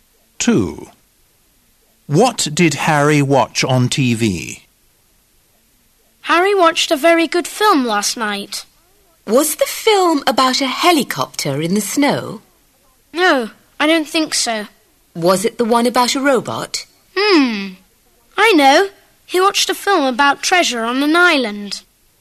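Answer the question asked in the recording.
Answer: a film about treasure on an island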